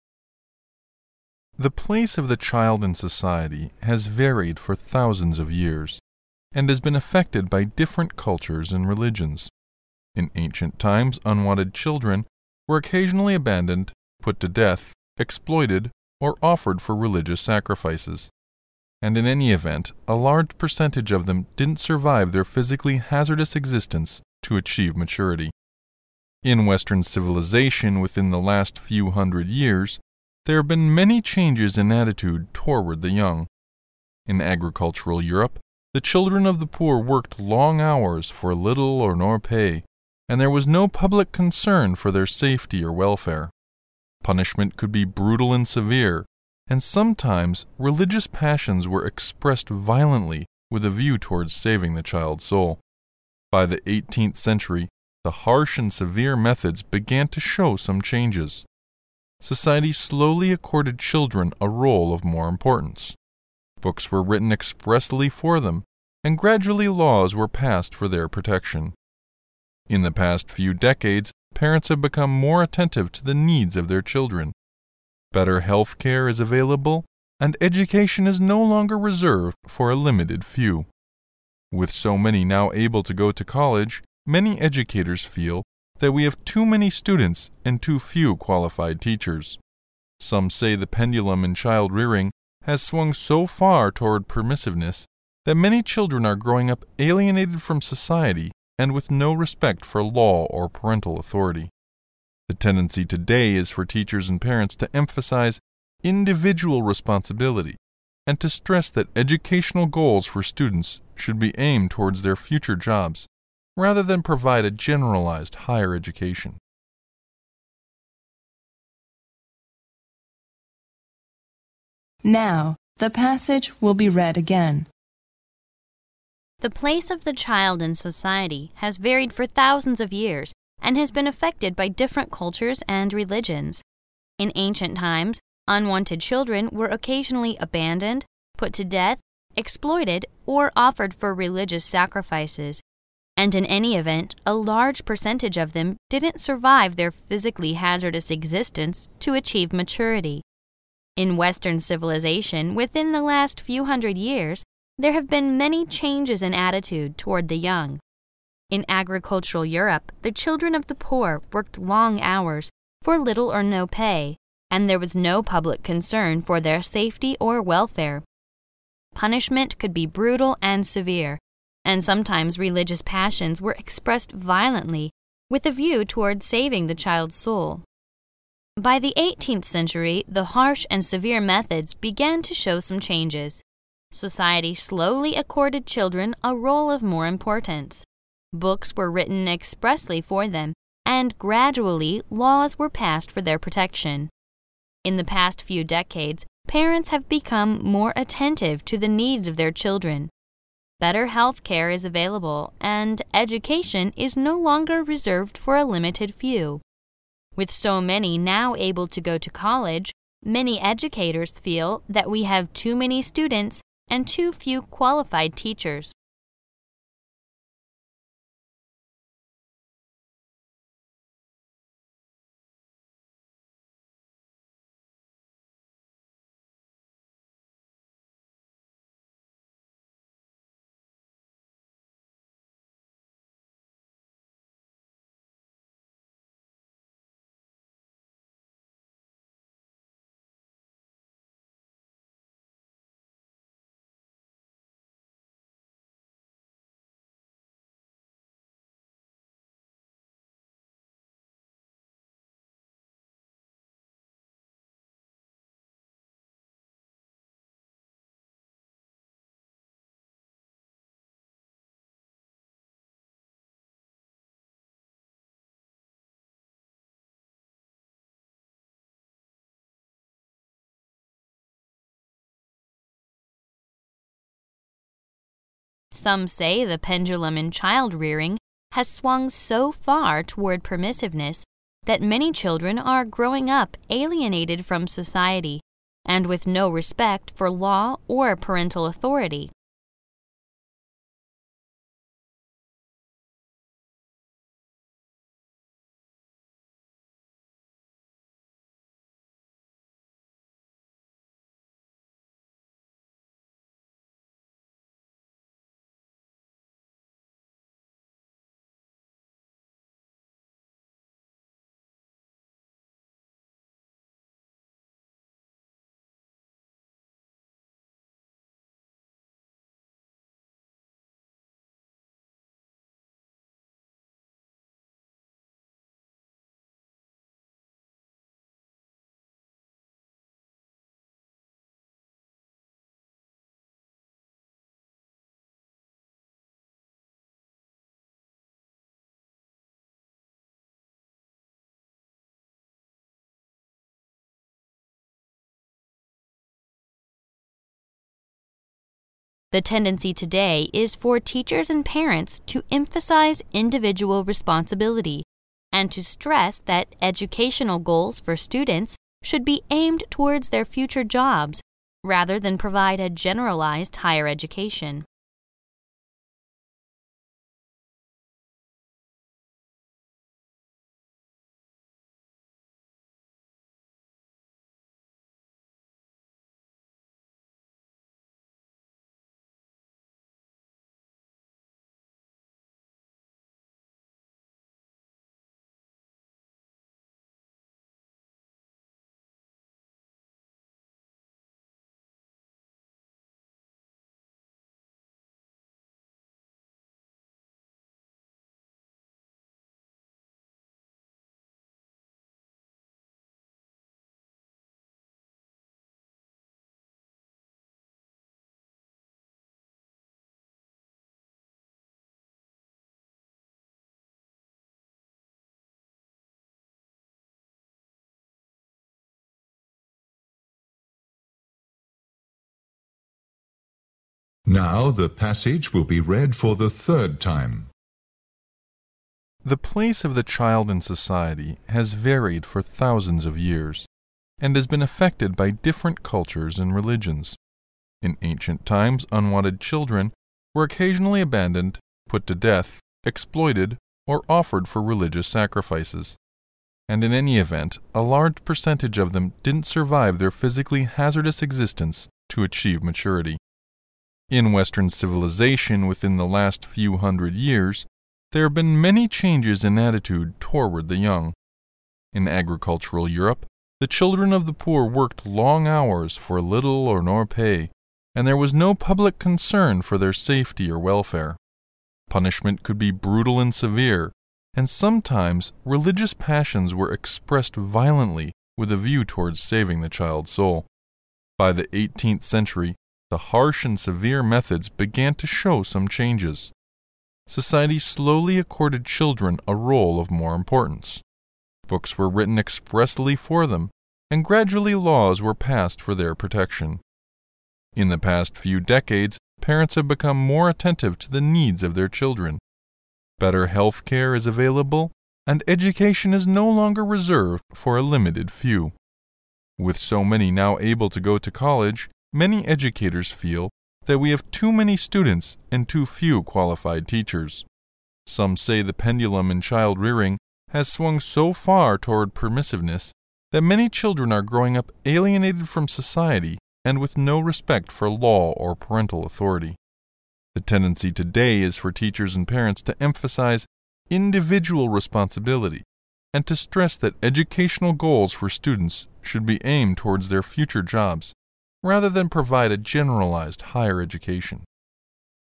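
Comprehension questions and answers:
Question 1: In ancient times unwanted children were occasionally 1 , put to death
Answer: abandoned

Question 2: a large percentage of them didn't 2 their physically hazardous existence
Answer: survive

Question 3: sometimes religious 3 were expressed violently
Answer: passions

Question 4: By the eighteenth century the harsh and 4 methods began to show some changes.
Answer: severe

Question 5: Society slowly 5 children a role of more importance.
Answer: accorded

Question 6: Books were written expressly for them and 6 laws were passed for their protection.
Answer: gradually

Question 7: In the past few 7 parents have become more attentive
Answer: decades

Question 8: education is no longer 8 for a limited few.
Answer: reserved

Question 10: Some' say the pendulum in child rearing has swung so far toward permissiveness that 10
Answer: many children are growing up away from society and have no respect for law or parental authority

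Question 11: The tendency today is for teachers and parents to emphasize individual responsibility and to stress that 11 .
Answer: educational goals for students should be aimed towards their future jobs rather than offer a generalized higher education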